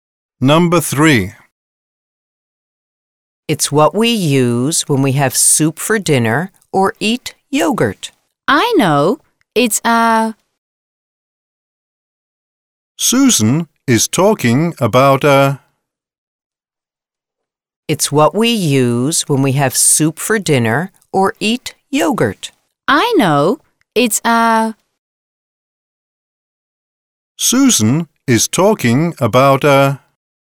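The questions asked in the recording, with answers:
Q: Susan is talking about a...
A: spoon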